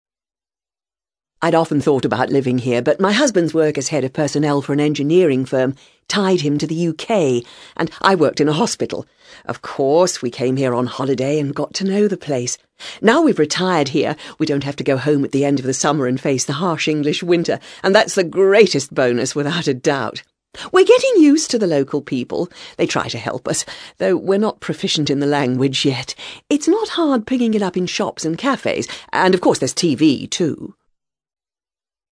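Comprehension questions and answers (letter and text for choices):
FOR QUESTIONS 1-5 choose from the list each speaker's present occupation.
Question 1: SPEAKER 1:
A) business person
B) pensioner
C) doctor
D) farmer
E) diplomat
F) student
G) engineer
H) architect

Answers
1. B) pensioner

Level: CAE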